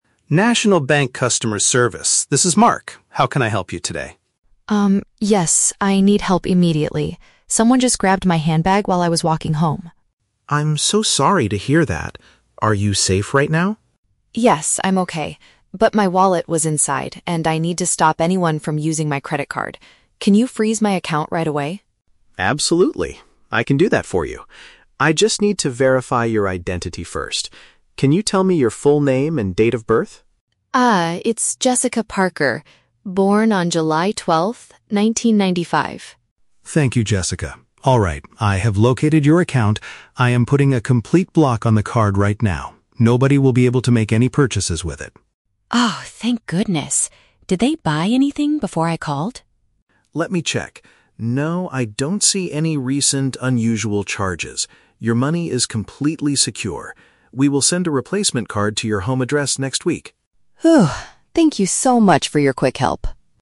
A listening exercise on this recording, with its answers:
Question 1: Why is Jessica calling the bank?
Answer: To stop thieves from making purchases with her money.

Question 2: What information does Mark ask for first?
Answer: Details to confirm who she is.

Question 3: What does the bank agent tell Jessica about her money?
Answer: It is perfectly safe because there are no new transactions.

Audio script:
Mark: National Bank customer service, this is Mark. How can I help you today?
Jessica: Um, yes, I need help immediately. Someone just grabbed my handbag while I was walking home.
Mark: I'm so sorry to hear that. Are you safe right now?
Jessica: Yes, I'm okay. But my wallet was inside, and I need to stop anyone from using my credit card. Can you freeze my account right away?
Mark: Absolutely. I can do that for you. I just need to verify your identity first. Can you tell me your full name and date of birth?
Jessica: Ah, it's Jessica Parker, born on July 12th, 1995.
Mark: Thank you, Jessica. Alright, I have located your account. I am putting a complete block on the card right now. Nobody will be able to make any purchases with it.
Jessica: Oh, thank goodness. Did they buy anything before I called?
Mark: Let me check... No, I don't see any recent, unusual charges. Your money is completely secure. We will send a replacement card to your home address next week.